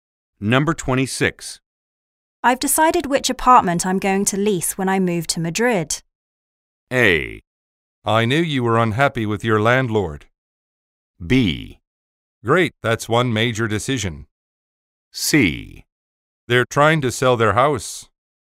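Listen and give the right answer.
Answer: B: Great, that's one major decision.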